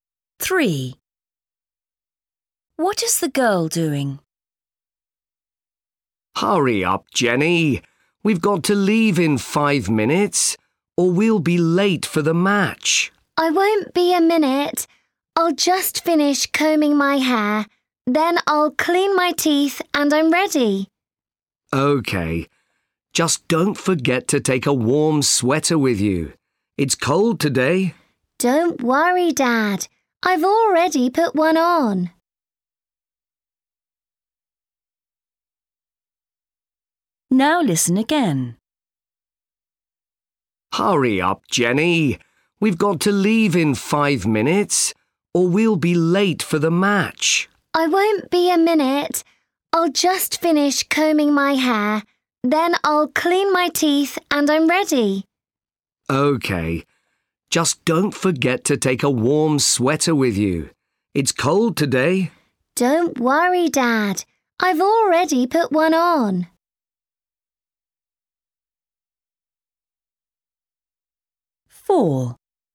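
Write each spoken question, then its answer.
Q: What is the girl doing?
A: combing her hair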